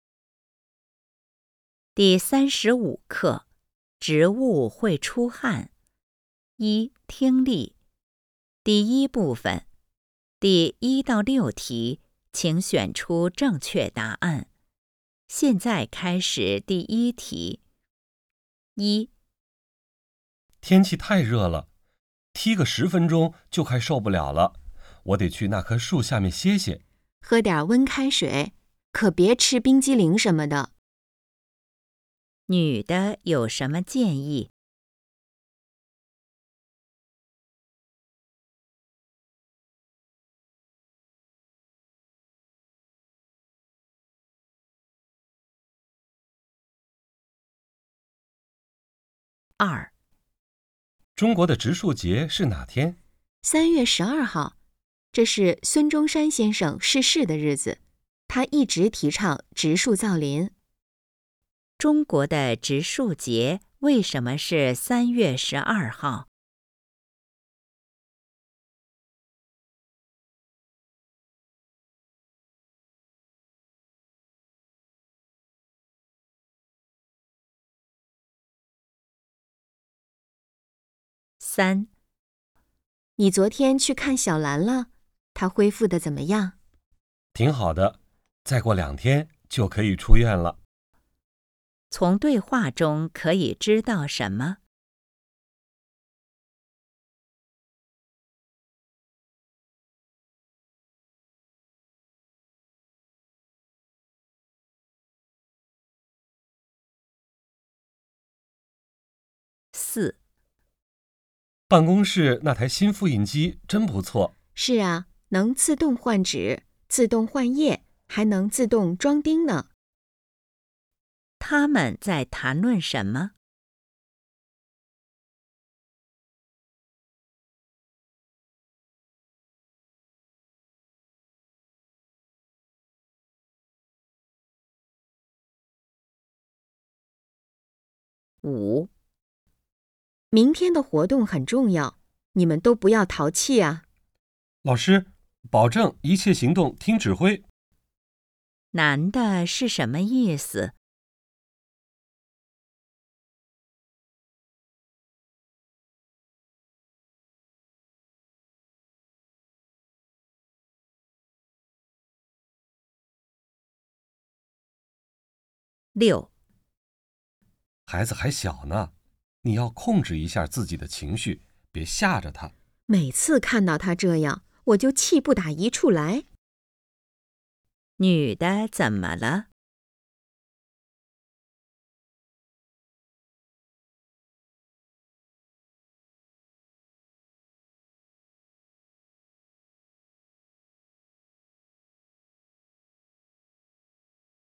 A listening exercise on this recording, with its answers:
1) 女的有什么建议?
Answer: 喝温水

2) 中国的植树节为什么是3月12号?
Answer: 纪念伟人

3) 从对话中可以知道什么?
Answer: 小兰住院了

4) 他们在谈论什么?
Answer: 新设备

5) 男的是什么意思?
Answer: 我们都听您的

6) 女的怎么了?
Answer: 为孩子生气

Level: HSK 5